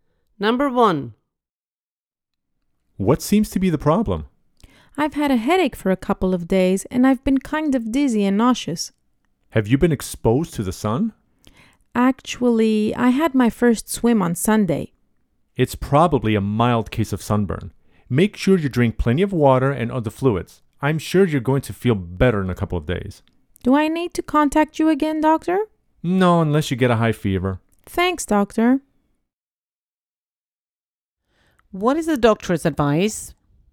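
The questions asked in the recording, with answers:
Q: What is the doctor's advice?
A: Drink plenty of water and other fluids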